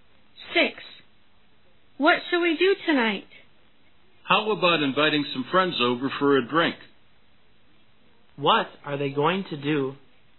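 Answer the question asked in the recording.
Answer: Invite some friends over for a drink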